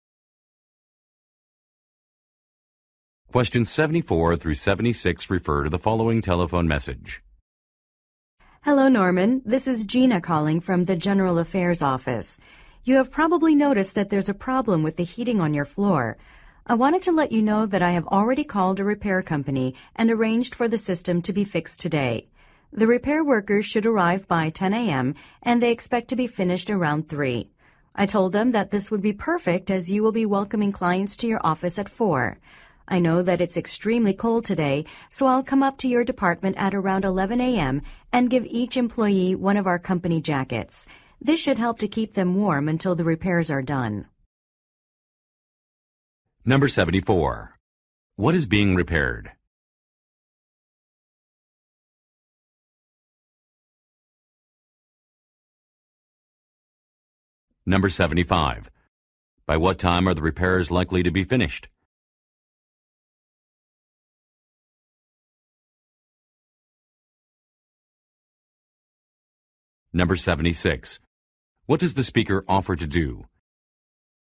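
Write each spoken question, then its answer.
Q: What is being repaired?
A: The heating system

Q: By what time are the repairs likely to be finished?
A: Around 3 p.m.

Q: What does the speaker offer to do?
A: Give each employee a company jacket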